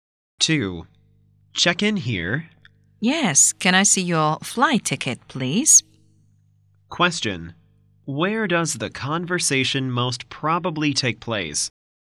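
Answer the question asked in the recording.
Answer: At an airport check-in counter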